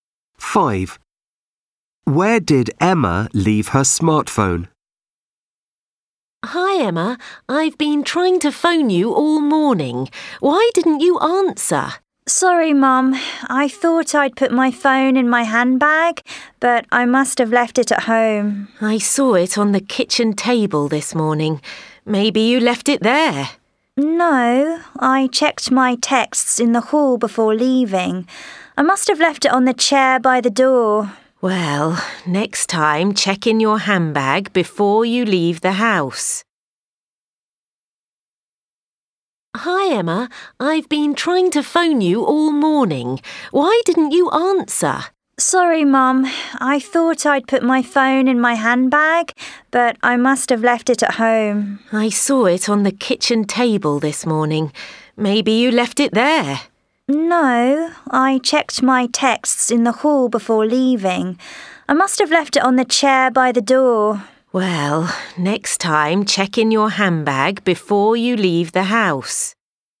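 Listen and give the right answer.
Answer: On the chair by the door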